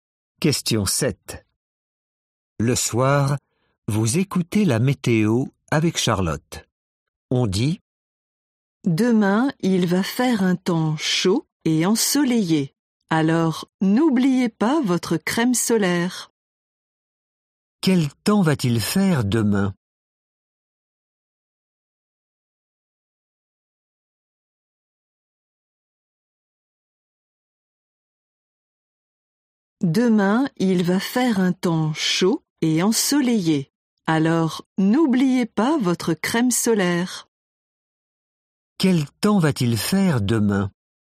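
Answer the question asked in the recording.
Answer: Chaud et ensoleillé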